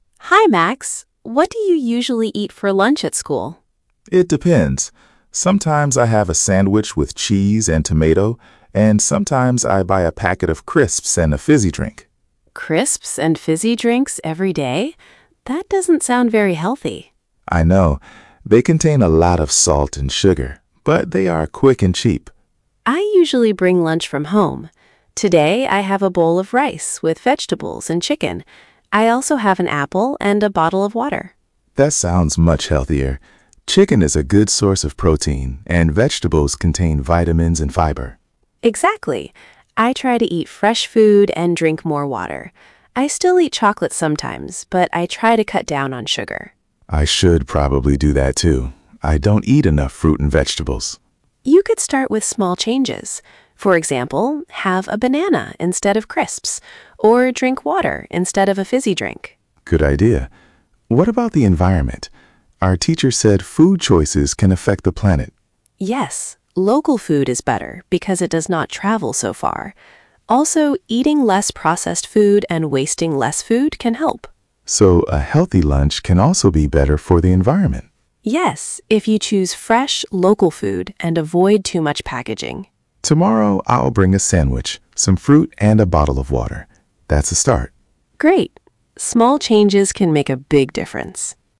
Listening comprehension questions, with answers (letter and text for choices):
Przeczytaj pytania, a potem posłuchaj i wybierz właściwą odpowiedź.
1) What are Lily and Max talking about?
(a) school uniforms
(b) lunch and healthy food choices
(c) a sports competition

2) What does Max often buy?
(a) crisps and a fizzy drink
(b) fish and rice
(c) a bowl of soup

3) What does Lily bring from home?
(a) a pizza and cola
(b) rice, vegetables, chicken, an apple and water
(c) only chocolate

Uzupełnij porady słowami z nagrania:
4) You should drink more ________.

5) You should eat more fruit and ________.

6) You should cut down on ________.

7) You could eat a banana instead of ________.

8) Choose fresh, ________ food if possible.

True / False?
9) Max sometimes buys crisps and a fizzy drink.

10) Lily has chicken, rice and vegetables for lunch.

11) Max eats enough fruit and vegetables.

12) Lily says local food can be better for the environment.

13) Max decides to bring a healthier lunch tomorrow.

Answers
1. (b) lunch and healthy food choices
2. (a) crisps and a fizzy drink
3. (b) rice, vegetables, chicken, an apple and water
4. water
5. vegetables
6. sugar
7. crisps
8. local
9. True
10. True
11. False
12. True
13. True

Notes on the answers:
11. he says he doesn't eat enough fruit and vegetables.

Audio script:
Lily: Hi, Max. What do you usually eat for lunch at school?
Max: It depends. Sometimes I have a sandwich with cheese and tomato, and sometimes I buy a packet of crisps and a fizzy drink.
Lily: Crisps and fizzy drinks every day? That doesn't sound very healthy.
Max: I know. They contain a lot of salt and sugar, but they are quick and cheap.
Lily: I usually bring lunch from home. Today I have a bowl of rice with vegetables and chicken. I also have an apple and a bottle of water.
Max: That sounds much healthier. Chicken is a good source of protein, and vegetables contain vitamins and fibre.
Lily: Exactly. I try to eat fresh food and drink more water. I still eat chocolate sometimes, but I try to cut down on sugar.
Max: I should probably do that too. I don't eat enough fruit and vegetables.
Lily: You could start with small changes. For example, have a banana instead of crisps, or drink water instead of a fizzy drink.
Max: Good idea. What about the environment? Our teacher said food choices can affect the planet.
Lily: Yes. Local food is better because it does not travel so far. Also, eating less processed food and wasting less food can help.
Max: So a healthy lunch can also be better for the environment?
Lily: Yes, if you choose fresh, local food and avoid too much packaging.
Max: Tomorrow I'll bring a sandwich, some fruit and a bottle of water. That's a start.
Lily: Great. Small changes can make a big difference.

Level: A2+/B1